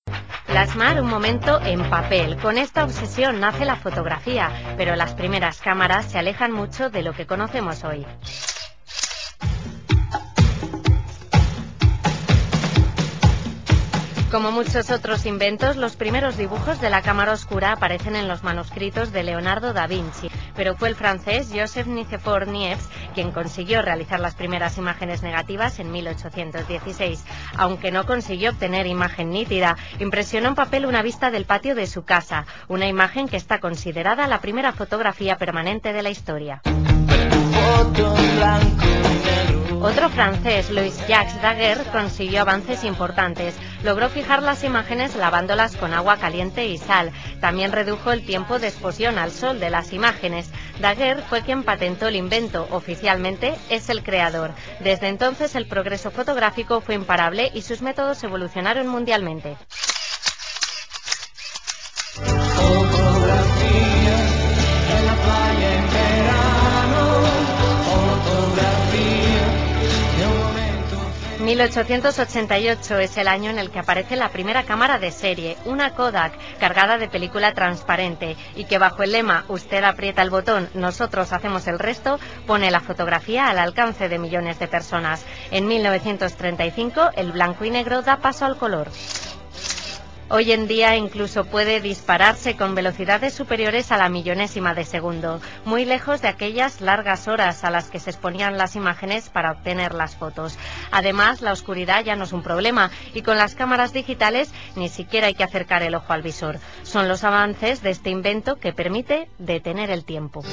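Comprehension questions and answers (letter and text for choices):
Escucha e indica la versión correcta.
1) Leonardo Da Vinci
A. hizo la primera cámara fotográfica, pero era muy diferente a la que conocemos hoy.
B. realizó dibujos para una cámara fotográfica.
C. hizo dibujos de una cámara oscura.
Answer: C. hizo dibujos de una cámara oscura.

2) Joseph Nicephore Niépce hizo la primera imagen fotográfica (negativa) en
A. 1686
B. 1788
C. 1816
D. 1888.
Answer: C. 1816

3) En la primera foto de Niépce se ve(n)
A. el patio de su casa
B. manuscritos de Da Vinci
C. a su amigo Daguerre.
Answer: A. el patio de su casa

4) Daguerre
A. inventó un tipo de cámara muy distinto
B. solicitó la patente del invento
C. dio dinero a Niépce para fabricar la cámara fotográfica.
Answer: B. solicitó la patente del invento

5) La primera cámara de serie (de la marca Kodak) apareció en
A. 1818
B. 1888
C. 1898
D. 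1918.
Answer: B. 1888

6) El lema de Kodak quería convencer a los clientes de que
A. se había vuelto muy fácil hacer fotografías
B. se había vuelto muy barato hacer fotografías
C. poder hacer fotografías era un gran privilegio y de que era normal que fuera caro.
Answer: A. se había vuelto muy fácil hacer fotografías

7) La fotografía en color apareció en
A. 1923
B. 1925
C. 1932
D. 1935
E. 1946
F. 1953.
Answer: D. 1935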